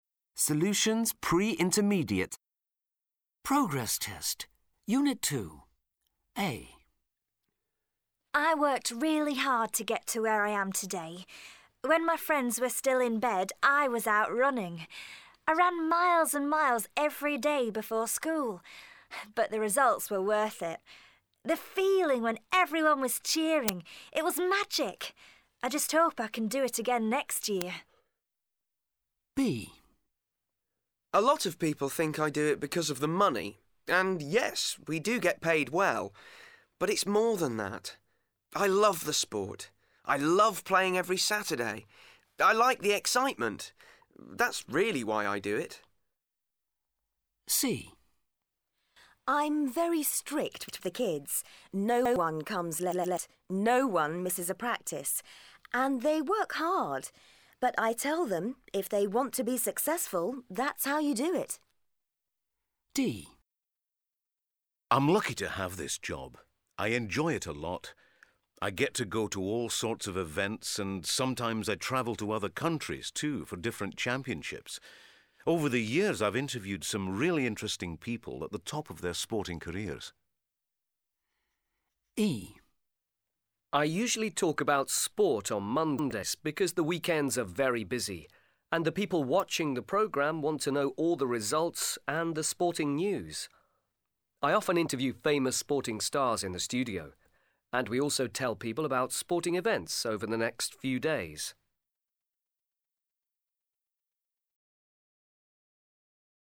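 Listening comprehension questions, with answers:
1. Listen to the radio interview. Match the speakers with the sporting careers. (Прослухайте радіо – інтерв'ю. Співставте спікерів зі спортивними кар'єрами )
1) Speaker A is a _________________.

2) Speaker B is a _________________.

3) Speaker C is a _________________.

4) Speaker D is a _________________.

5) Speaker E is a _________________.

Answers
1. runner
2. professional player
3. coach
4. sports journalist
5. sports presenter

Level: 8 - А клас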